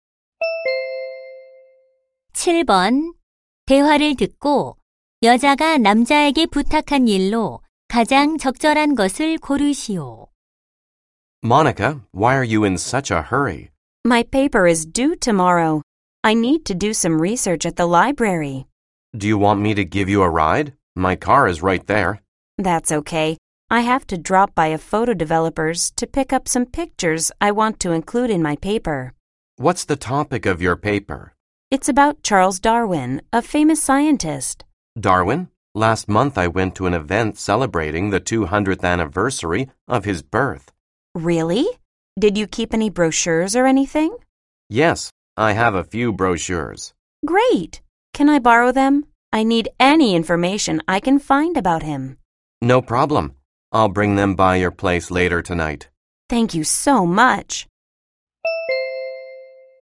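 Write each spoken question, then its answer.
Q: 대화를 듣고 여자가 남자에게 부탁한 일로 가장 적절한 것을 고르시오.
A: 다윈 관련 안내책자 빌려주기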